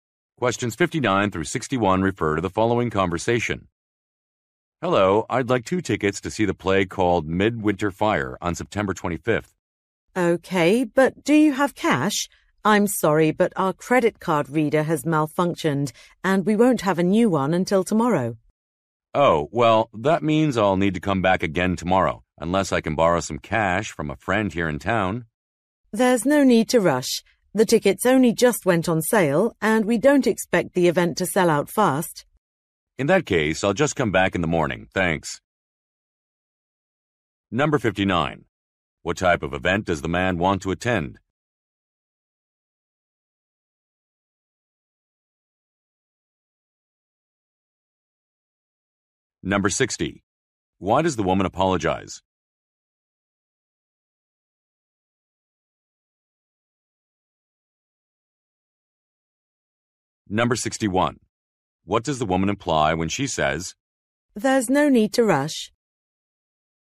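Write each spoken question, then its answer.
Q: What type of event does the man want to attend?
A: A play

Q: Why does the woman apologize?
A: The credit card reader is broken

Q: What does the woman imply when she says,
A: The tickets will not sell out quickly, so he can come back later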